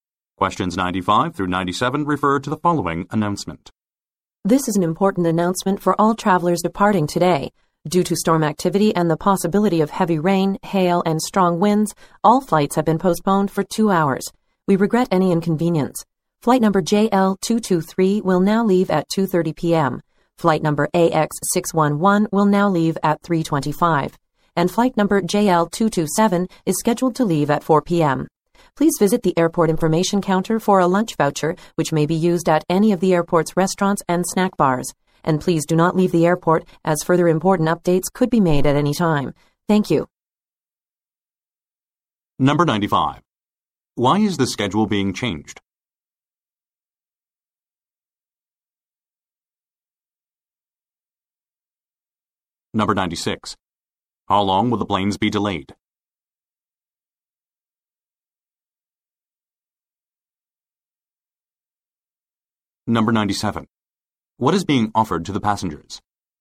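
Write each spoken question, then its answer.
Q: Why is the schedule being changed?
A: Because of storms

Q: How long will the planes be delayed?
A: 2 hours

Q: What is being offered to the passengers?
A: A lunch voucher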